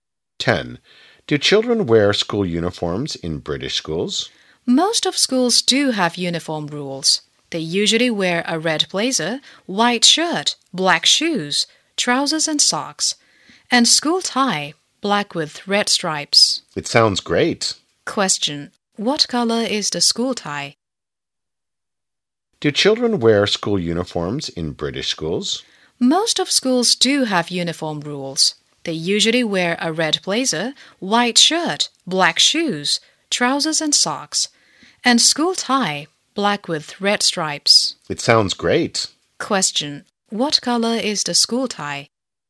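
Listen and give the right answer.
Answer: Black with red stripes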